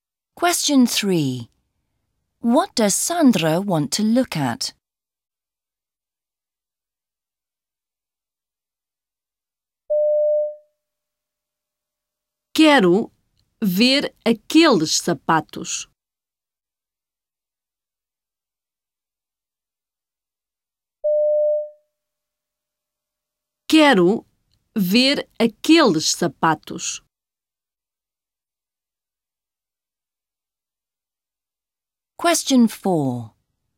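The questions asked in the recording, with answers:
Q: What does Sandra want to look at?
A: Those shoes (aqueles sapatos)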